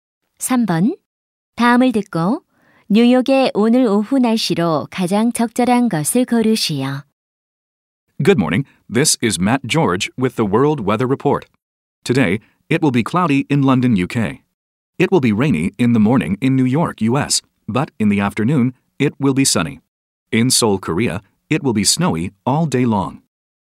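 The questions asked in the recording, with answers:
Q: 다음을 듣고 뉴욕의 오늘 오후 날씨로 가장 적절한 것을 고르시오.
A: 맑음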